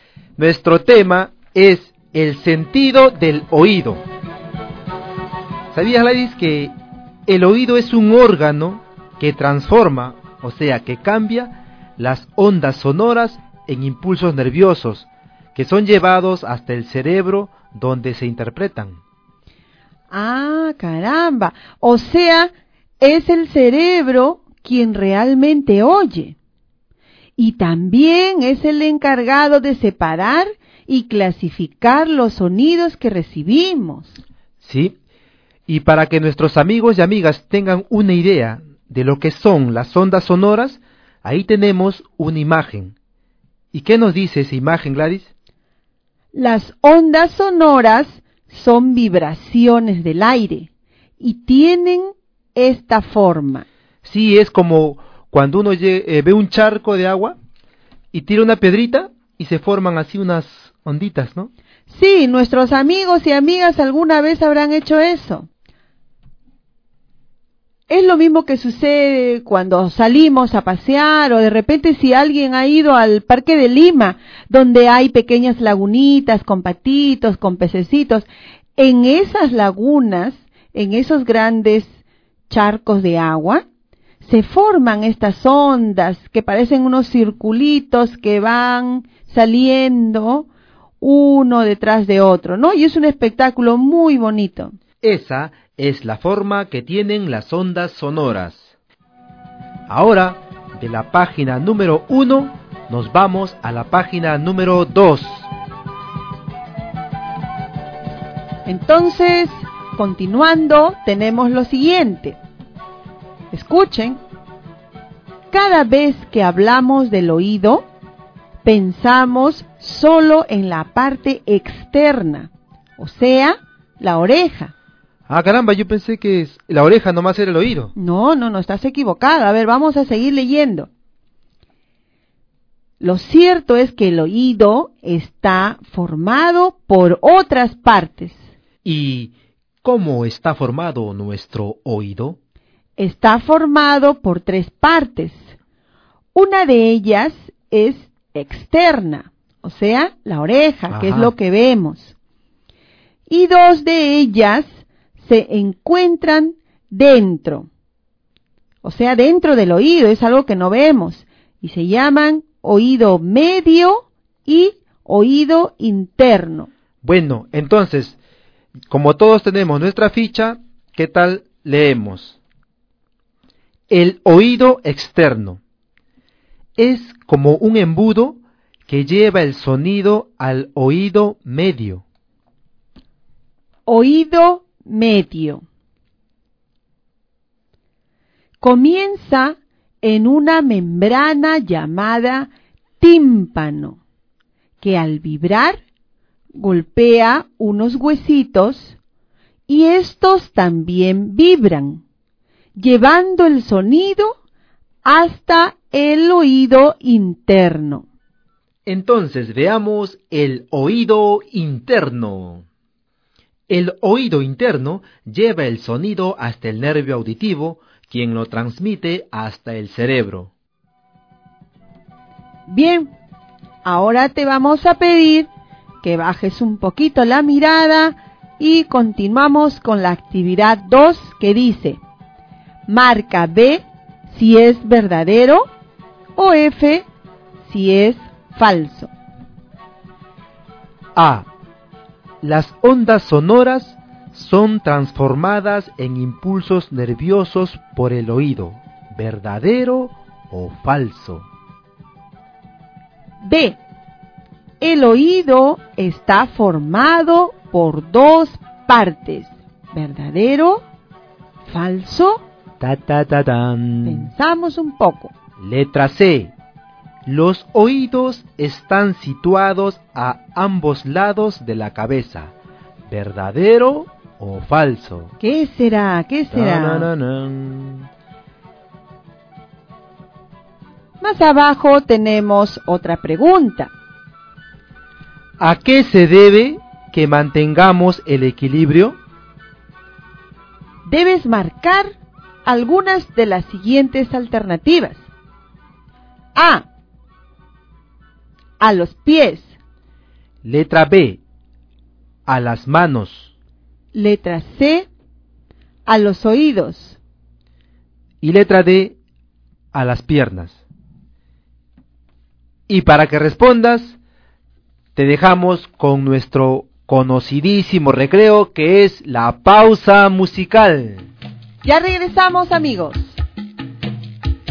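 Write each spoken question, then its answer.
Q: A. Las ondas sonoras son transformadas en impulsos nerviosos por el oído.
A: Verdadero

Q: B. El oído está formado por dos partes.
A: Falso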